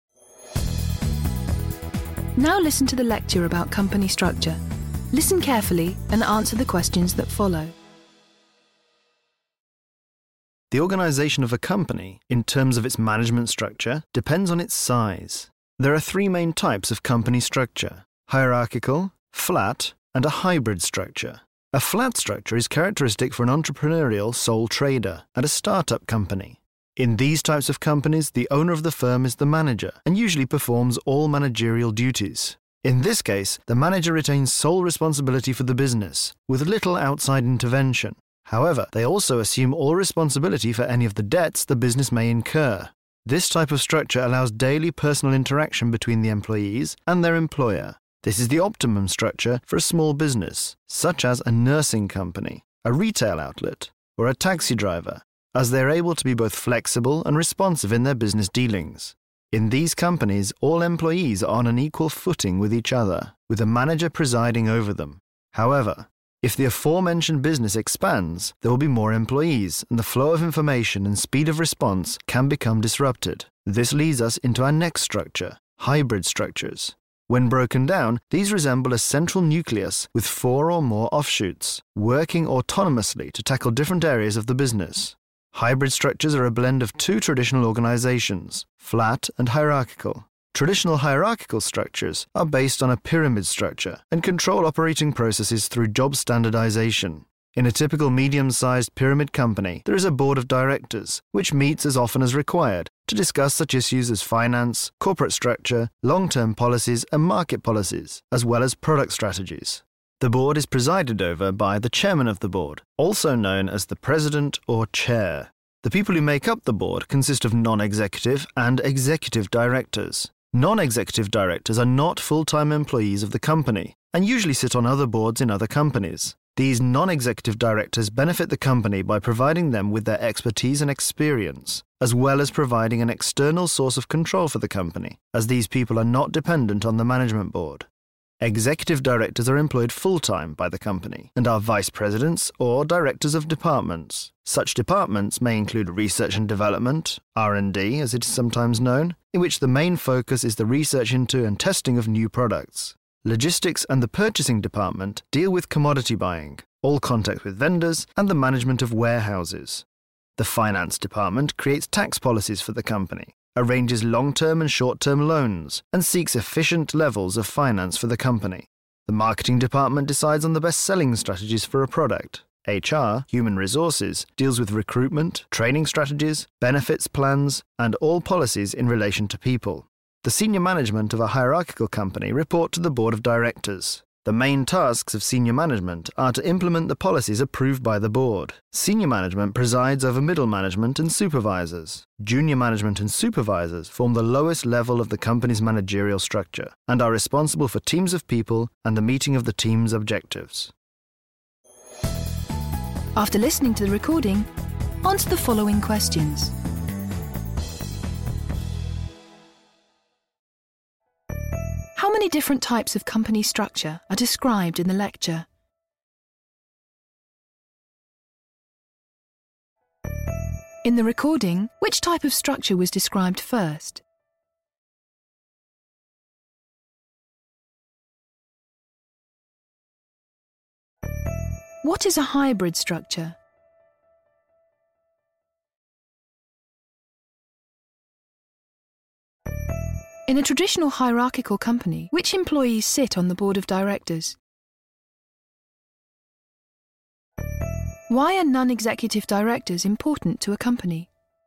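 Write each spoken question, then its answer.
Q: How many different types of company structure are described in the lecture?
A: Three: hierarchical, flat and hybrid

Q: In the recording, which type of structure was described first?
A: The flat structure

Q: What is a hybrid structure?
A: A blend of flat and hierarchical structures: a central nucleus with four or more offshoots working autonomously

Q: In a traditional hierarchical company, which employees sit on the board of directors?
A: Non-executive and executive directors, presided over by the chairman

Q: Why are non-executive directors important to a company?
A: They provide expertise and experience and an external source of control, as they don't depend on the management board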